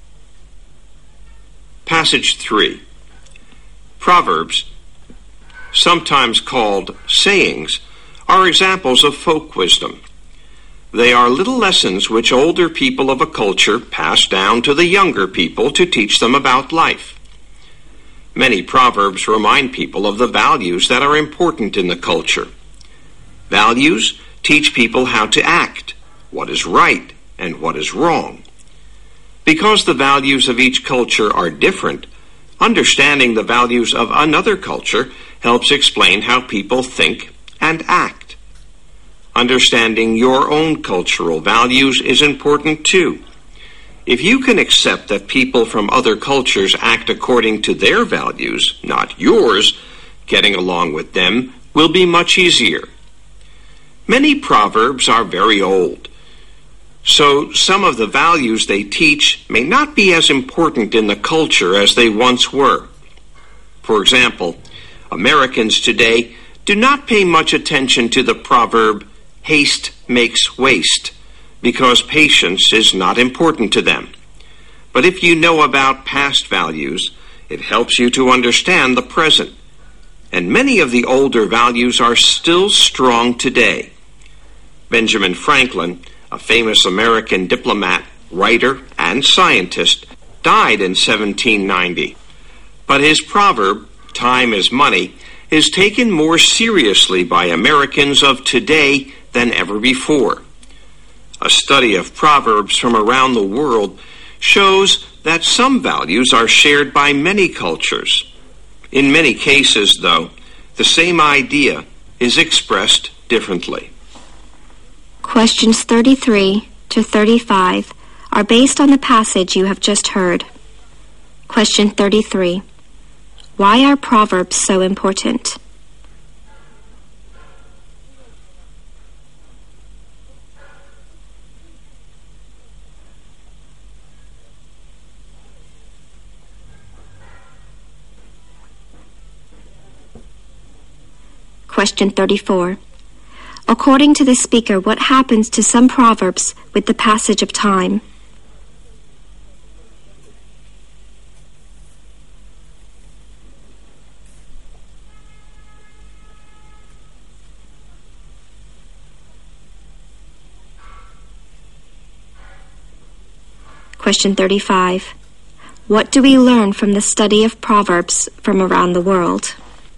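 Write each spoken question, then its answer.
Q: Why are proverbs so important?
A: They teach people a culture's values

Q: According to the speaker, what happens to some proverbs with the passage of time?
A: The values they teach may become less important

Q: What do we learn from the study of proverbs from around the world?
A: Some values are shared by many cultures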